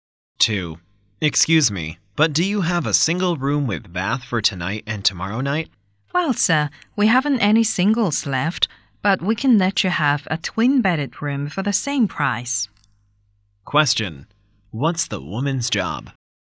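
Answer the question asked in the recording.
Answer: A hotel receptionist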